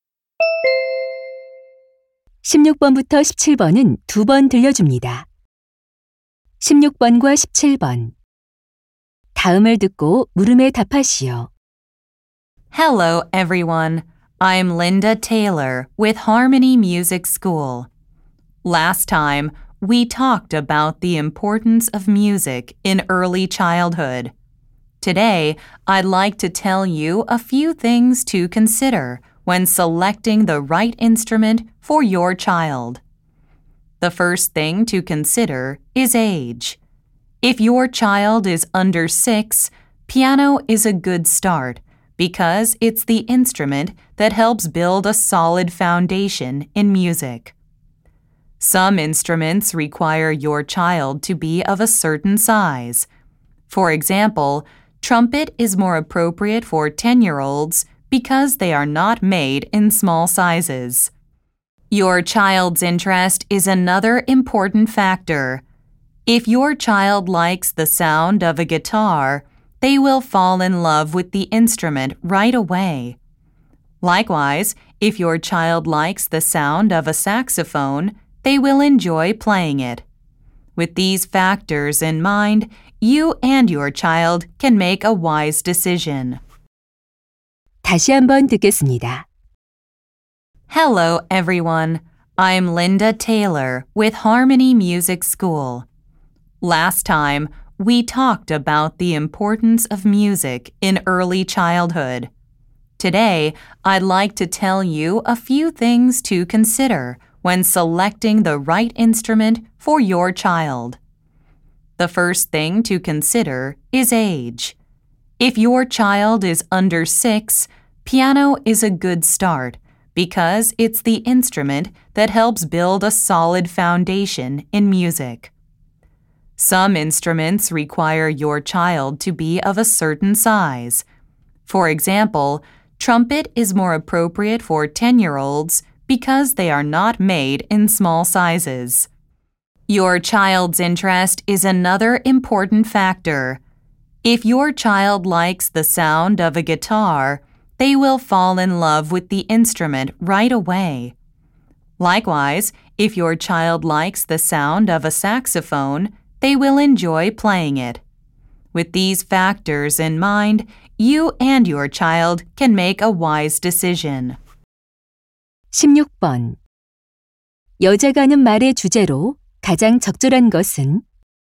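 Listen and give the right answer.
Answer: 아이에게 맞는 악기를 고를 때 고려할 점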